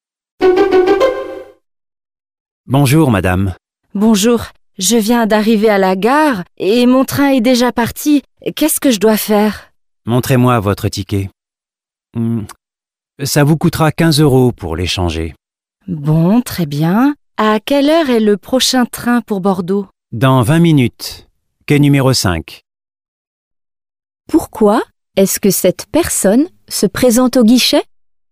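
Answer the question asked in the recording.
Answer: Parce qu'elle a raté son train et doit échanger son billet.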